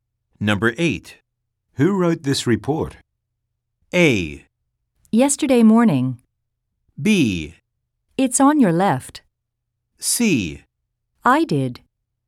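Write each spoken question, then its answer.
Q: Who wrote this report?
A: C: I did.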